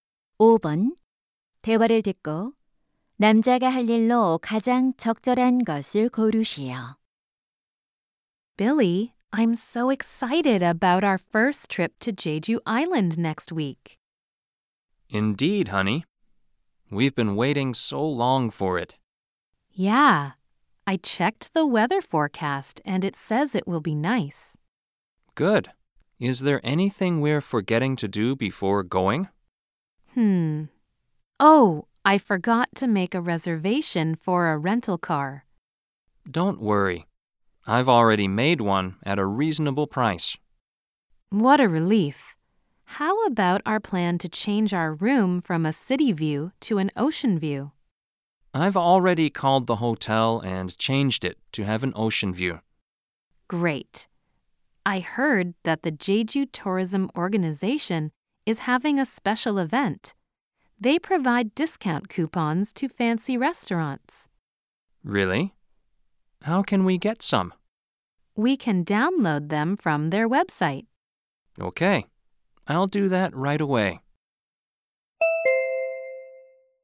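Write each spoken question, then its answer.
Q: 대화를 듣고 남자가 할 일로 가장 적절한 것을 고르시오.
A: 웹사이트에서 할인 쿠폰 내려받기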